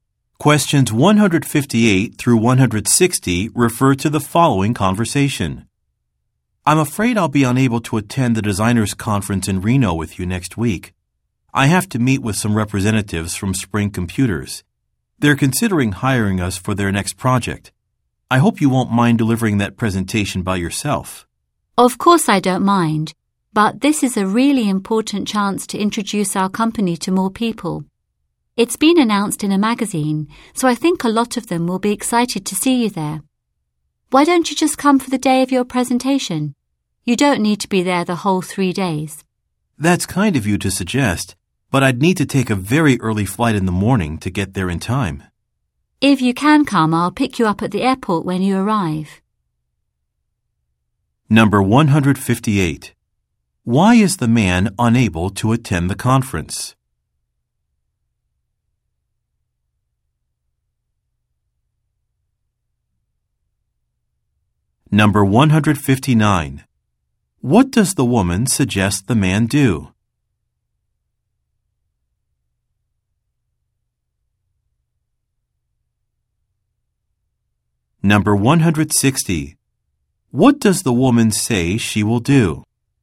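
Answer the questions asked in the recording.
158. He has to meet with representatives from Spring Computers.
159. Come just for the day of his presentation.
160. Pick him up at the airport.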